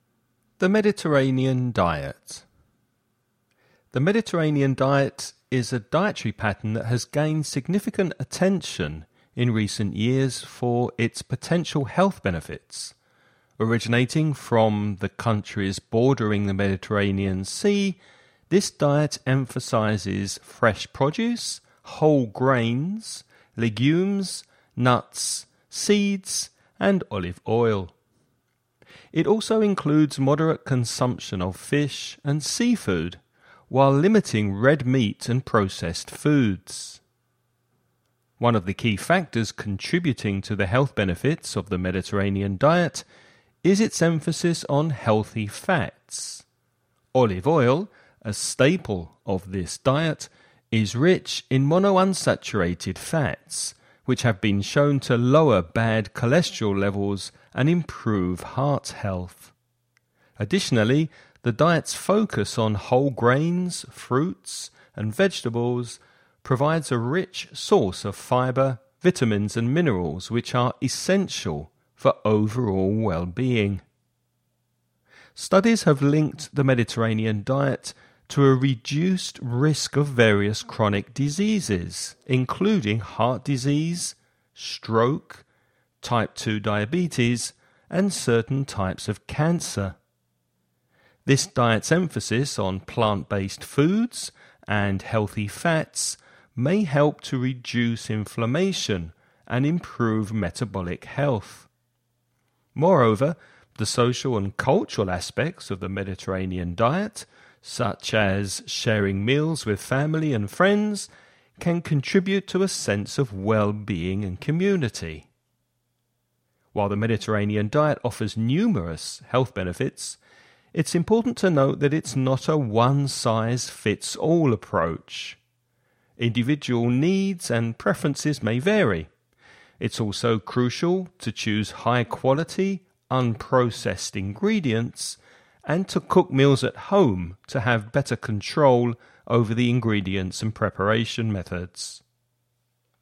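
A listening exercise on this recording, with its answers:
You're going to listen to a man talking about the Mediterranean diet. Before you listen, read the following questions.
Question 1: What are some of the key components of the Mediterranean diet?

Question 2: How does the Mediterranean diet contribute to heart health?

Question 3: What are some of the chronic diseases that the Mediterranean diet may help to prevent?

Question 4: What is the importance of choosing high-quality ingredients and cooking meals at home when following the Mediterranean diet?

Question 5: Is the Mediterranean diet suitable for everyone?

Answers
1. Fresh produce, whole grains, legumes, nuts, seeds and olive oil, with moderate fish and seafood
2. Olive oil is rich in monounsaturated fats, which lower bad cholesterol and improve heart health
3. Heart disease, stroke, type 2 diabetes and certain types of cancer
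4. It gives better control over the ingredients and preparation methods
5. Not necessarily; it is not one-size-fits-all, as individual needs and preferences vary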